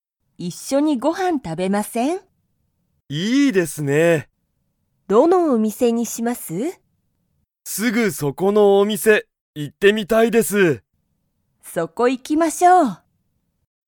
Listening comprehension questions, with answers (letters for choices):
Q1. 高田(たかだ)さんは一人(ひとり)でご飯(はん)を食(た)べますか?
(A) はい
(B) いいえ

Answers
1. B

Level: Level 1